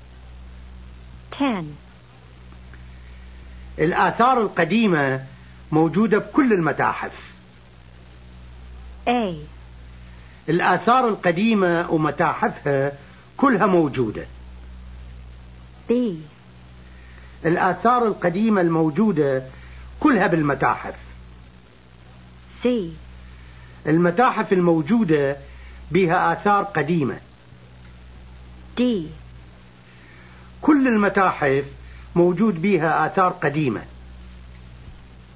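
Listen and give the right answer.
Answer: D: كل المتاحف موجود بها آثار قديمة.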